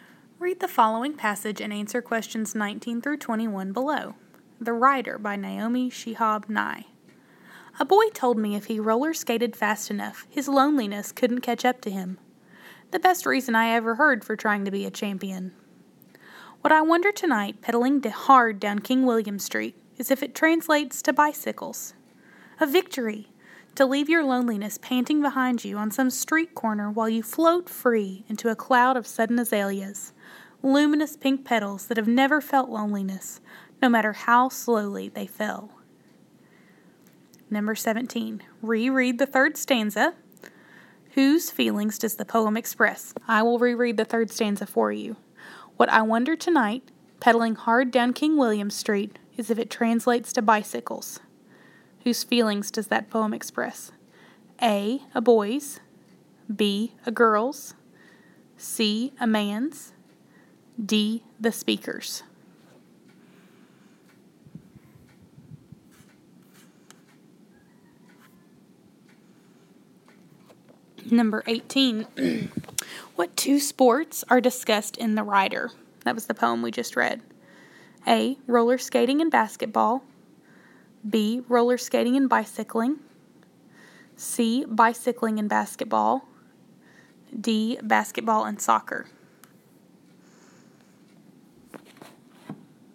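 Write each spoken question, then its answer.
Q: Whose feelings does the poem express?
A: D: The speaker's.

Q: What two sports are discussed in The Rider?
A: B: Roller skating and bicycling.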